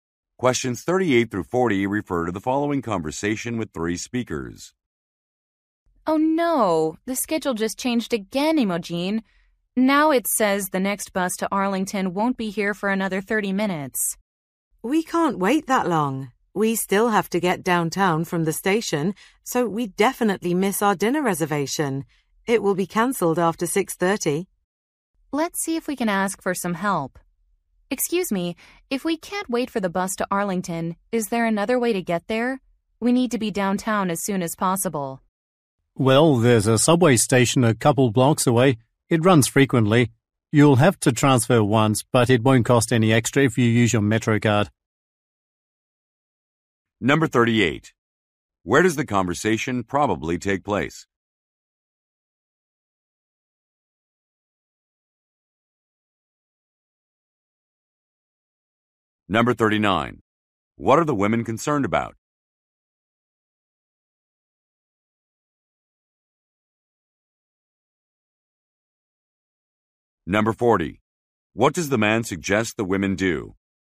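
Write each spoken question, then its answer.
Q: Where does the conversation probably take place?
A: At a bus station

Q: What are the women concerned about?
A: Missing their dinner reservation

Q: What does the man suggest the women do?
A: Take the subway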